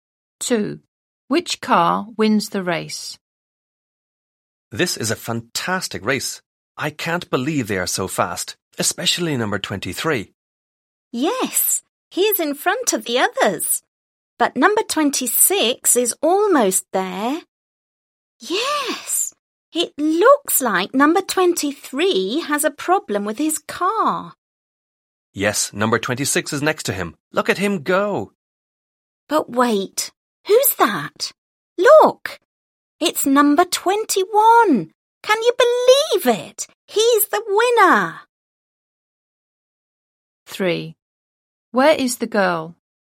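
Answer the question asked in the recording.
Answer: Number 21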